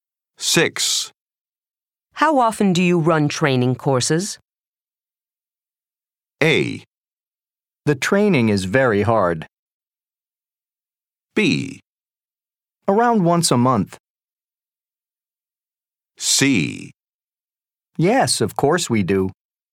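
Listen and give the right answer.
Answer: B: Around once a month.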